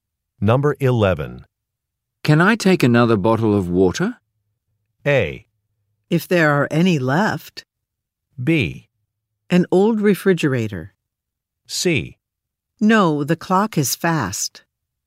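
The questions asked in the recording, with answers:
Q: Can I take another bottle of water?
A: A: If there are any left.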